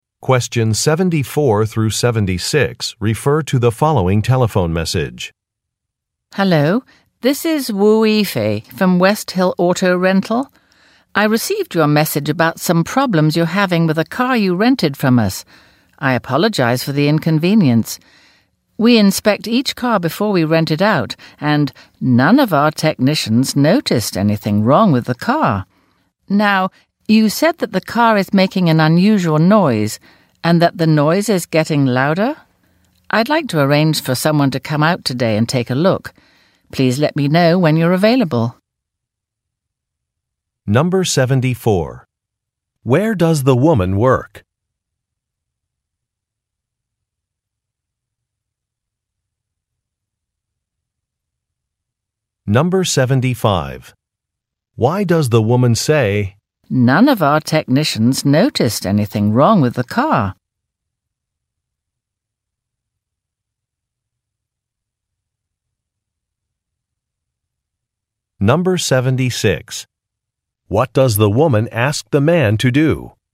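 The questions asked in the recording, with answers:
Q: Where does the woman work?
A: At a car rental company (West Hill Auto Rental)

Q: What does the woman ask the man to do?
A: Let her know when he is available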